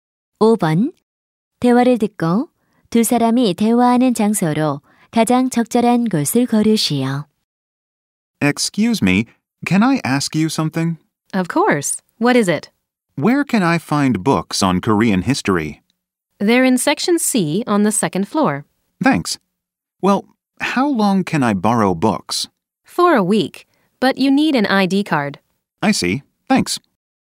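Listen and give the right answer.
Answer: 도서관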